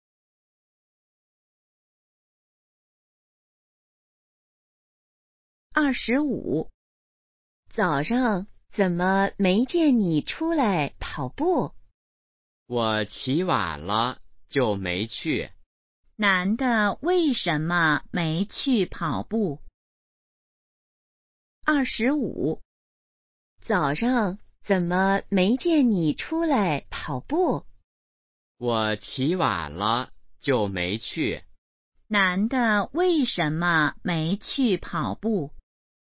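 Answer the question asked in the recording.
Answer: 起晚了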